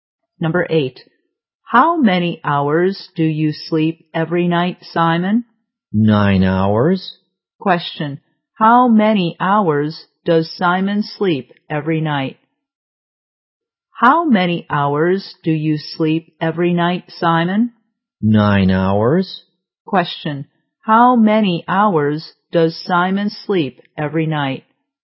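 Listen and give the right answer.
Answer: 9 hours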